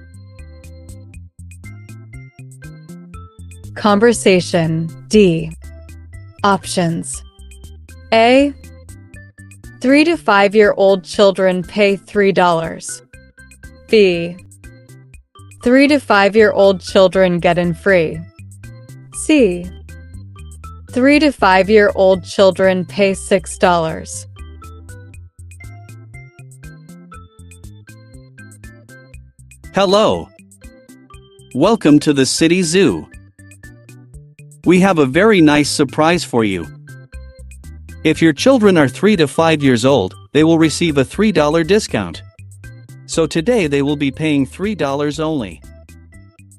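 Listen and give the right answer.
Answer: A: 3 to 5 year old children pay $3.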